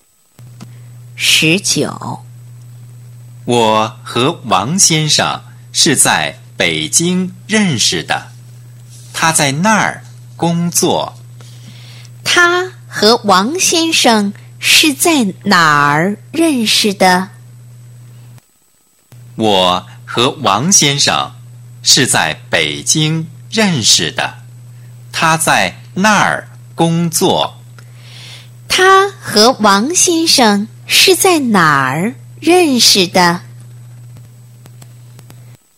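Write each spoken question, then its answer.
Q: 他和王先生是在哪儿认识的?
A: 北京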